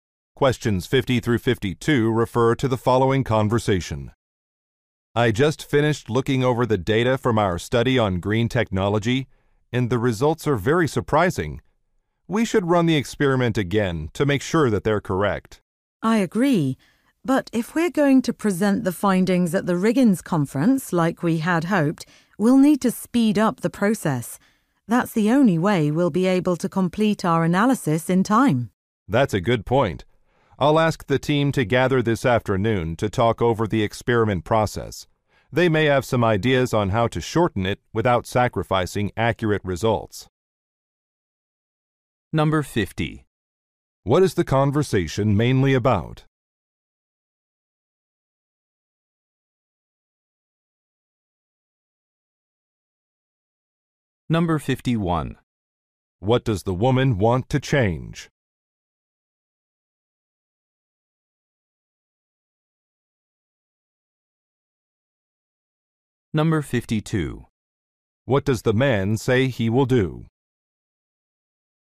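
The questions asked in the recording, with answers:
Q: What is the conversation mainly about?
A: Results of a green technology study

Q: What does the woman want to change?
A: Speed up the experiment process

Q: What does the man say he will do?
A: Ask the team to meet this afternoon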